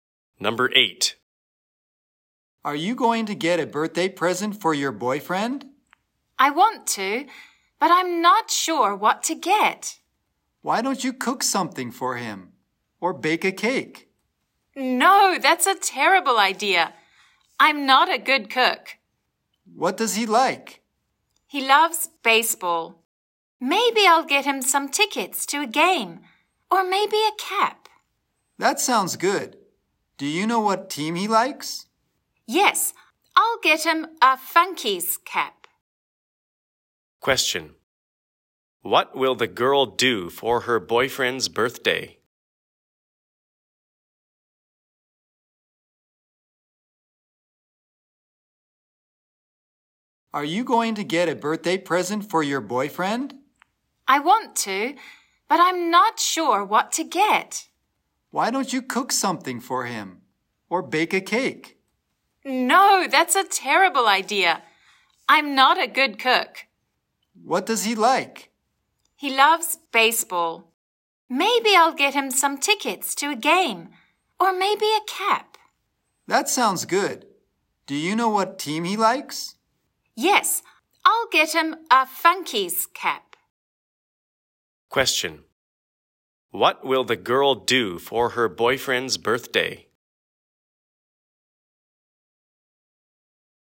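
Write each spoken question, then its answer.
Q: What will the girl do for her boyfriend's birthday?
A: Get him a Funkys baseball cap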